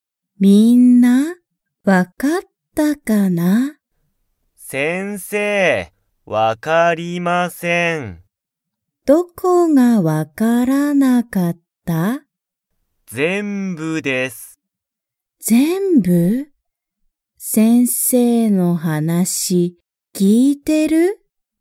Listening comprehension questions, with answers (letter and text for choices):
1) 吉田(よしだ)くんは、先生(せんせい)の話(はなし)が分(わ)かりましたか?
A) はい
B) いいえ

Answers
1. B) いいえ

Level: Level 1